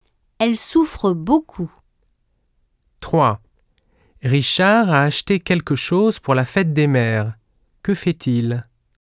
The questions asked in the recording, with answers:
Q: Que fait-il?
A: Il offre un cadeau à sa mère.